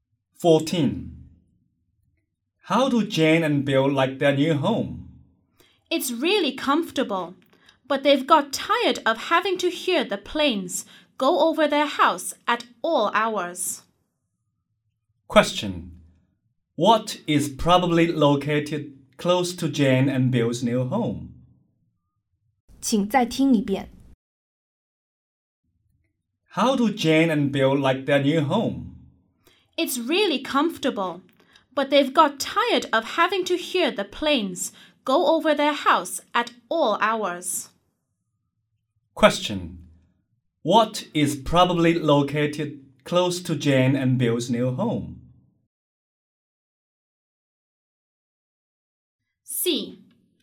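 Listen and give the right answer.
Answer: An airport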